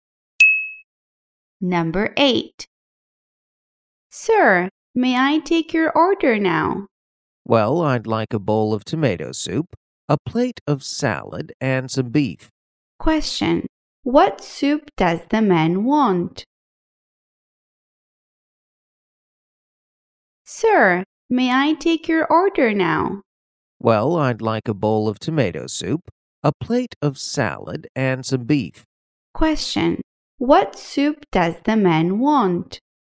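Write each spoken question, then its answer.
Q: Question. What soup does the man want?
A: Tomato soup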